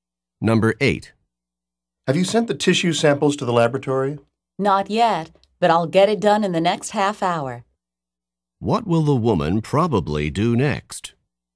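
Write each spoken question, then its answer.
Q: What will the woman probably do next?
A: Send the tissue samples to the laboratory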